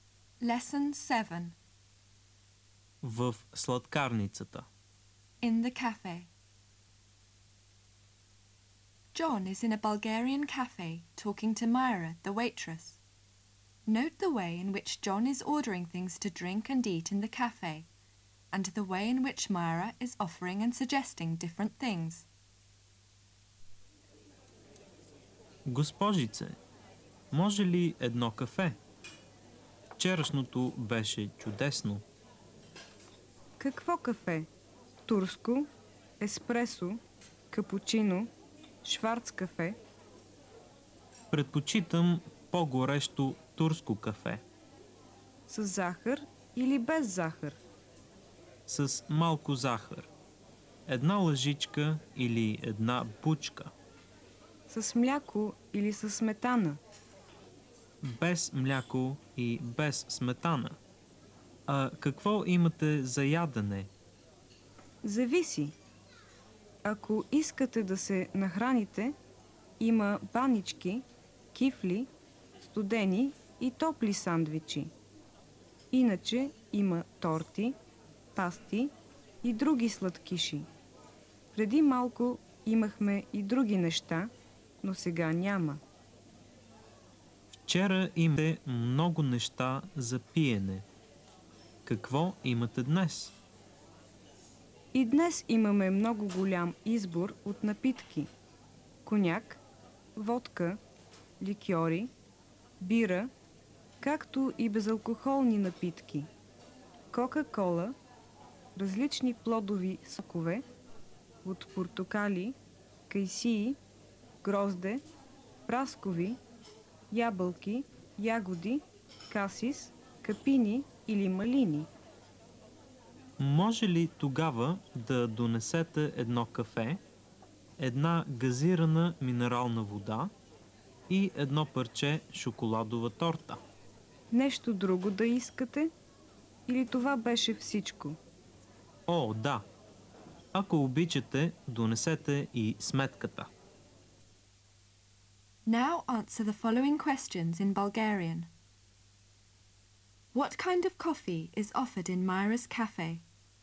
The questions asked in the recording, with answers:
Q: What kind of coffee is offered in Myra's cafe?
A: Турско, еспресо, капучино, шварц кафе.